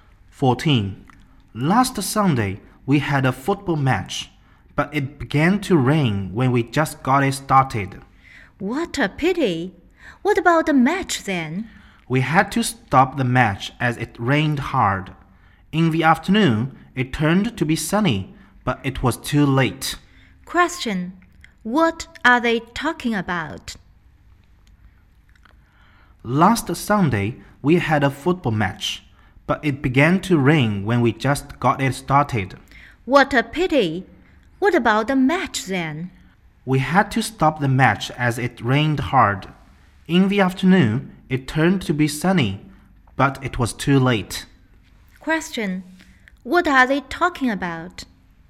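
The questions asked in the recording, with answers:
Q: What are they talking about?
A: A football match that was stopped by the rain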